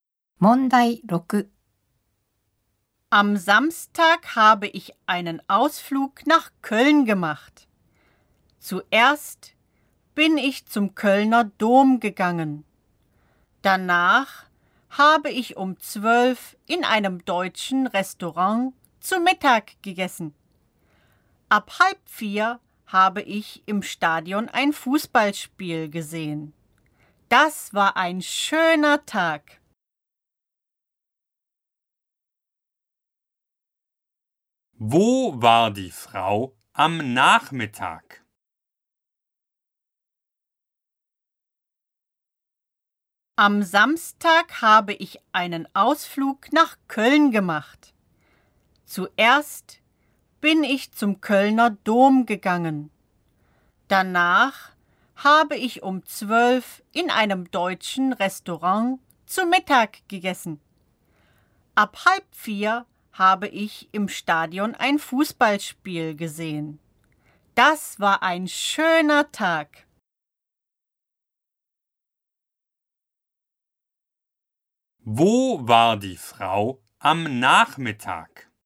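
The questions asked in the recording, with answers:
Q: Wo war die Frau am Nachmittag?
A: Im Stadion.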